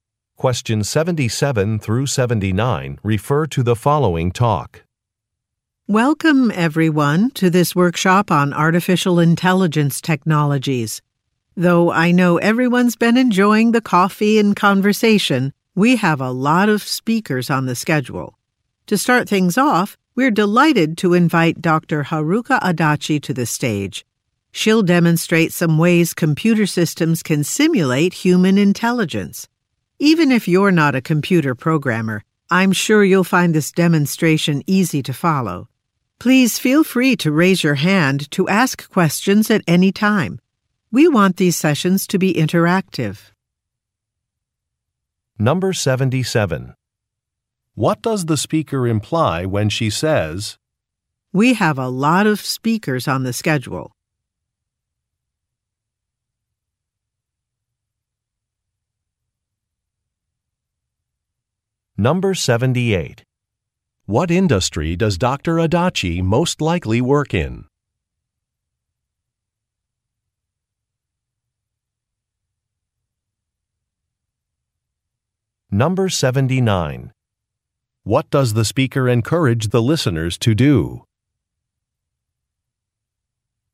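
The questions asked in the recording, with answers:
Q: Adachi most likely work in?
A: Artificial intelligence / computer technology

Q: What does the speaker encourage the listeners to do?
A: Ask questions at any time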